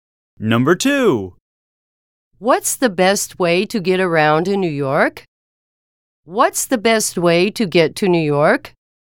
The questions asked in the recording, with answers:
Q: What's the best way to get to New York?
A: Different is the correct answer.